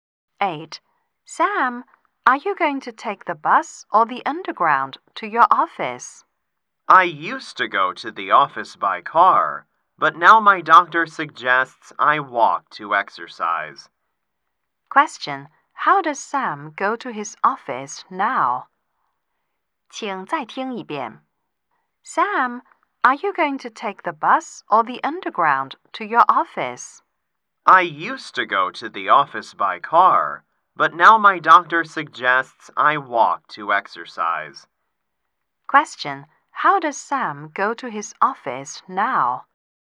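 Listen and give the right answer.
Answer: On foot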